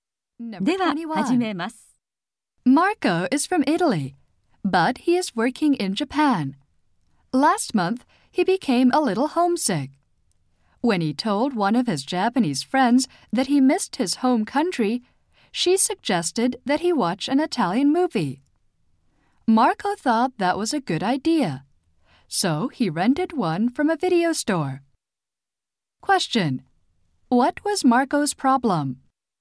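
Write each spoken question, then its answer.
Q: Question: What was Marco's problem?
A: He was homesick.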